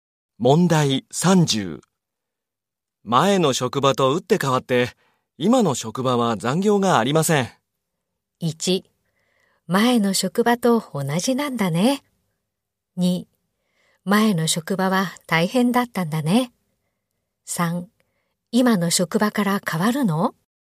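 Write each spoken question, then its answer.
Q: 前の職場と打って変わって、今の職場は残業がありません。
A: 2: 前の職場は大変だったんだね。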